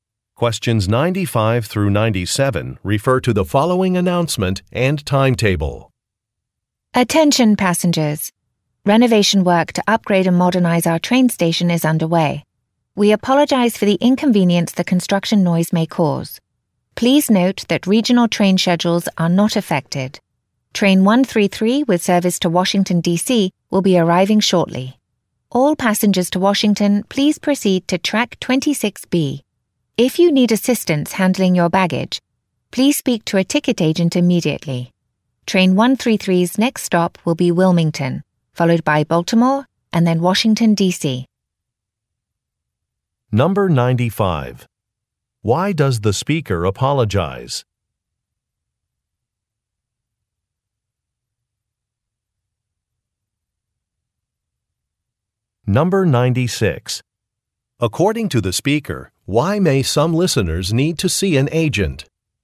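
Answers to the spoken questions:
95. For construction noise
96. To get help with baggage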